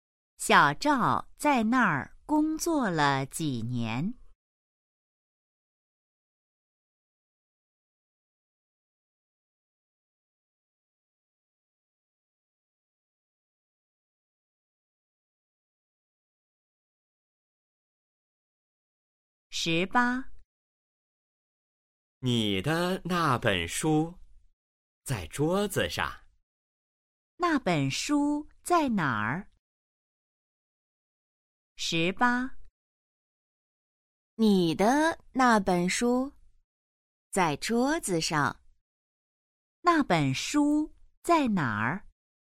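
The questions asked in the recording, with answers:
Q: 那本书在哪儿?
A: 桌子上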